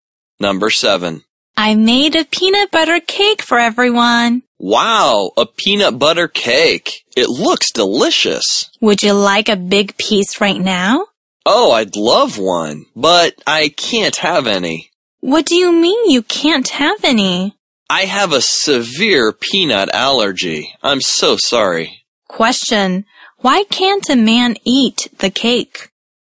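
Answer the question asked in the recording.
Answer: He has a severe peanut allergy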